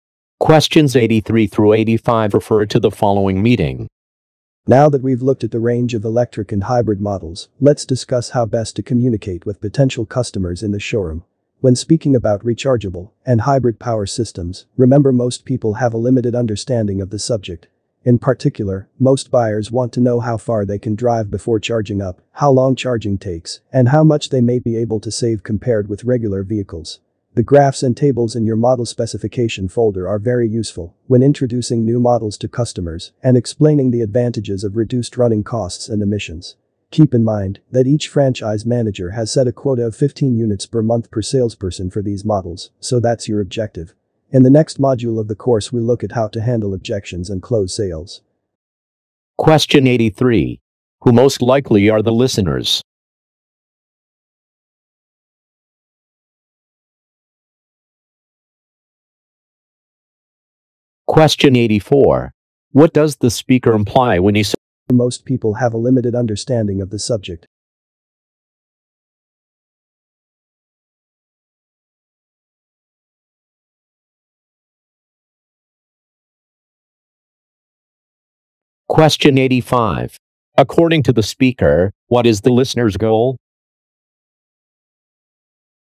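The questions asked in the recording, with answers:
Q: Who most likely are the listeners?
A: Car salespeople

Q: According to the speaker, what is the listener's goal?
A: To sell 15 units of these models per month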